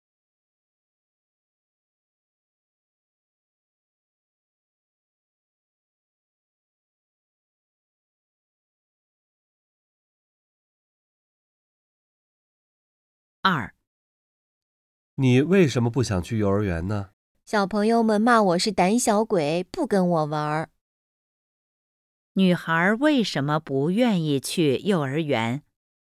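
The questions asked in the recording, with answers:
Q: 女孩为什么不愿意去幼儿园?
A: 小朋友骂她是胆小鬼,不跟她玩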